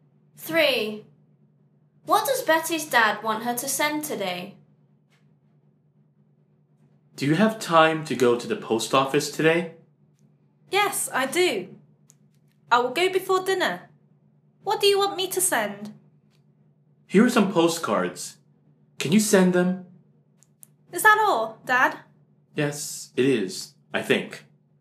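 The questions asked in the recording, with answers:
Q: What does Betty's dad want her to send today?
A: postcards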